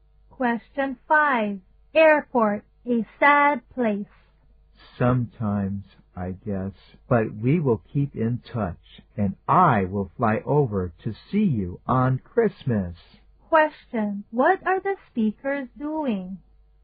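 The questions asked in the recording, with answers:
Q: What are the speakers doing?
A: Saying goodbye at the airport.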